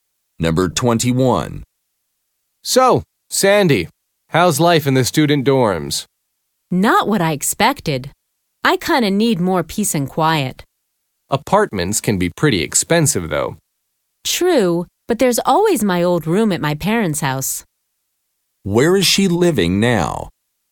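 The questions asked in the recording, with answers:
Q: Where is she living now?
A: In the student dorms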